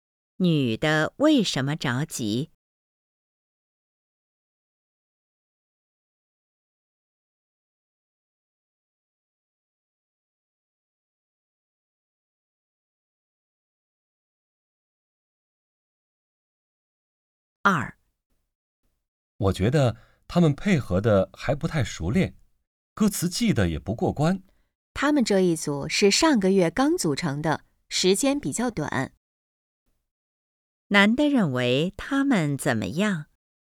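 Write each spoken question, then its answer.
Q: 男的认为他们怎么样?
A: 配合还不太熟练,歌词记得也不过关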